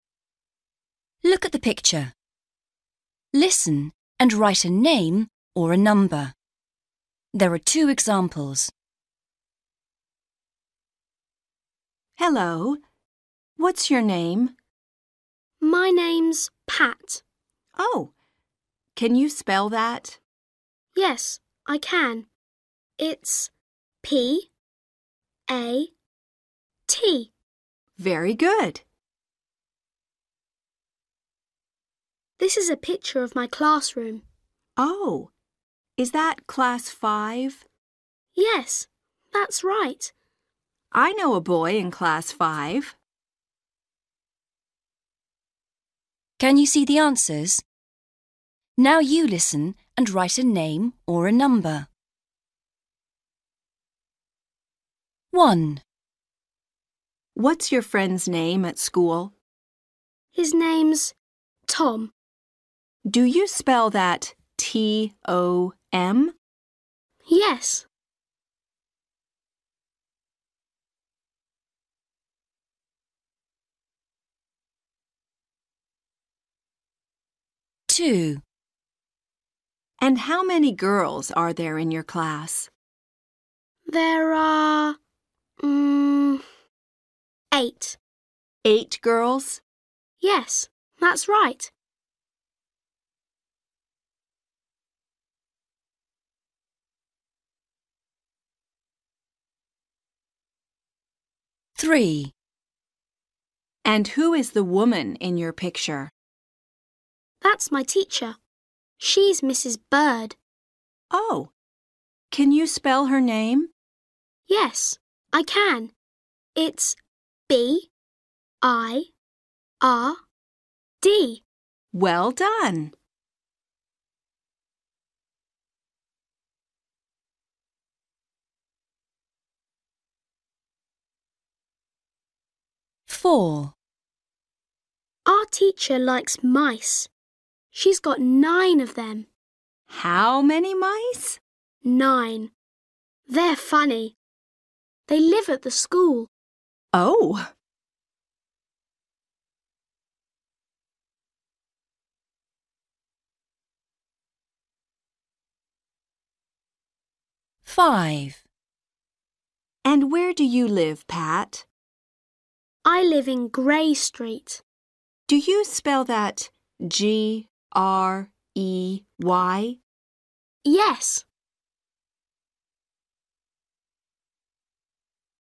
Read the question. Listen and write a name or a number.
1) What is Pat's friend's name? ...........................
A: Tom

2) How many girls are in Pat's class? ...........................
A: 8/eight

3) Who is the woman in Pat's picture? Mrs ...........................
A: Bird

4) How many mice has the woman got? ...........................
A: 9/nine

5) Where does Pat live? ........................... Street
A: Grey

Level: Starters